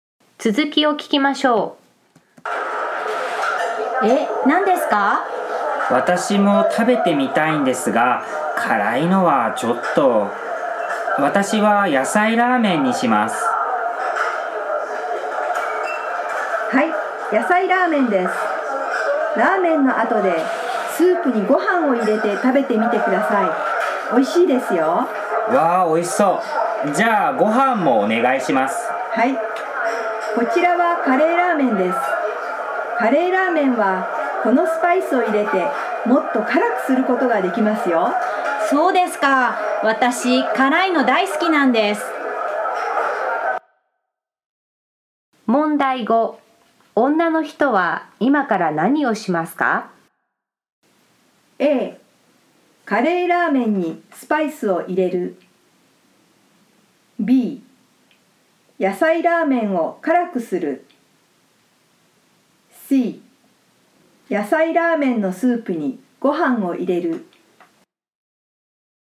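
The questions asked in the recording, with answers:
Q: 女の人は今から何をしますか?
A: A: カレーラーメンにスパイスを入れる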